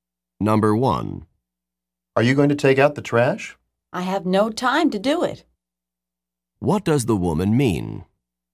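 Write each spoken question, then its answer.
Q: What does the woman mean?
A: She won't take out the trash because she has no time.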